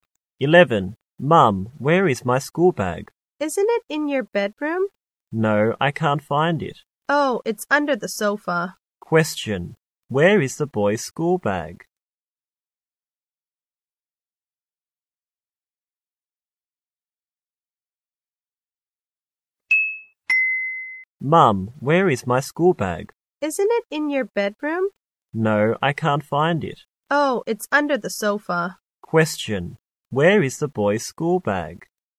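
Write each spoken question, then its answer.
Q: Where is the boy's school bag?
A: Under the sofa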